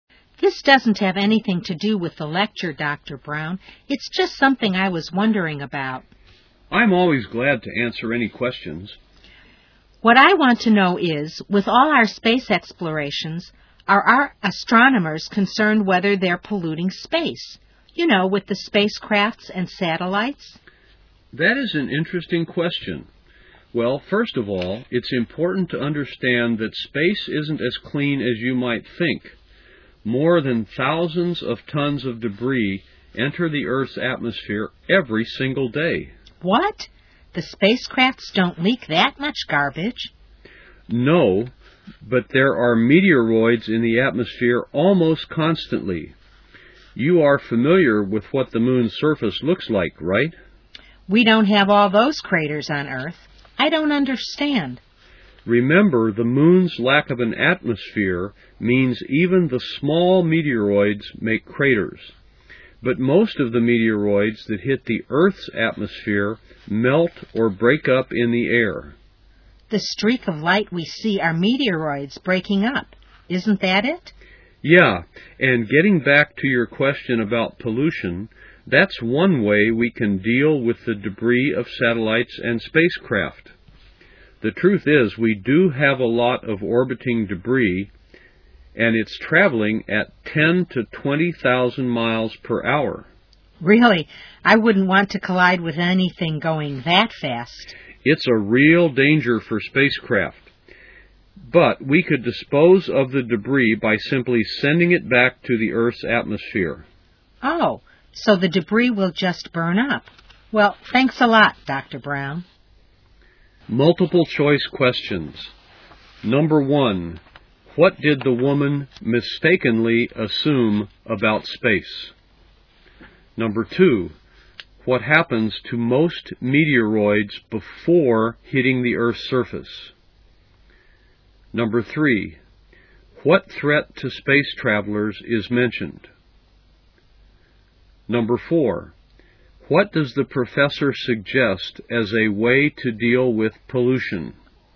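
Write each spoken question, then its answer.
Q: what happens to most meteoroids before hitting the Earth's surface?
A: They melt or break up in the atmosphere

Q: what threat to space travelers is mentioned?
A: Orbiting debris traveling at very high speeds

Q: what does the professor suggest as a way to deal with pollution?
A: Sending the debris back into Earth's atmosphere to burn up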